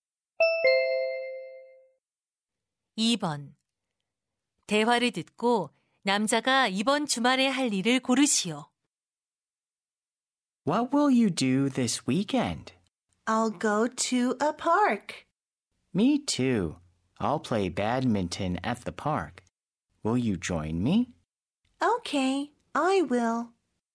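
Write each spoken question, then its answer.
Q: 대화를 듣고 남자가 이번 주말에 할 일을 고르시오.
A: 공원에서 배드민턴 치기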